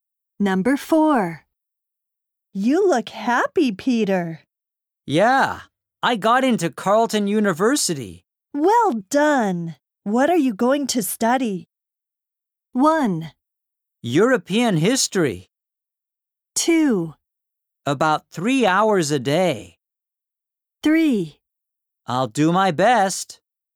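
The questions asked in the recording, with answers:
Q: Well done. What are you going to study?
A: 1: European history.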